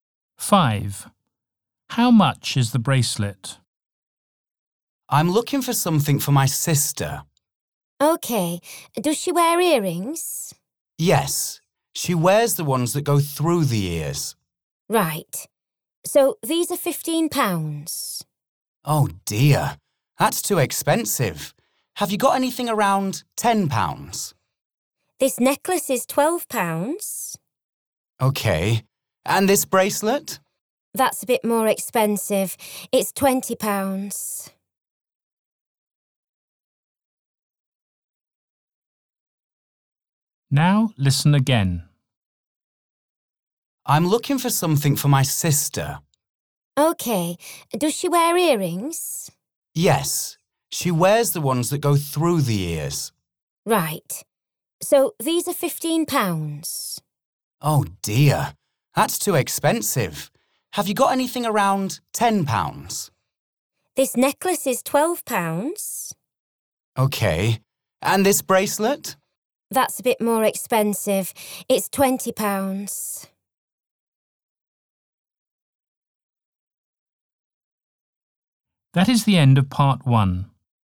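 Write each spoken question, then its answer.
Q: How much is the bracelet?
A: £20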